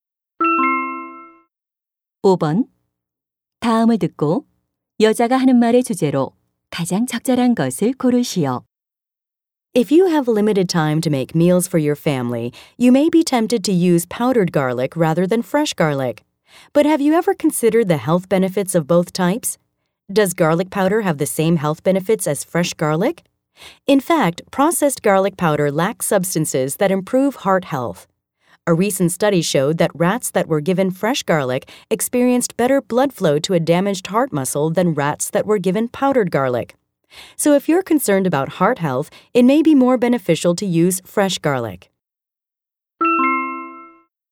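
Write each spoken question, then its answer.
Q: 다음을 듣고 여자가 하는 말의 주제로 가장 적절한 것을 고르시오.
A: 심장 건강에 가루 마늘보다 생마늘이 더 이로움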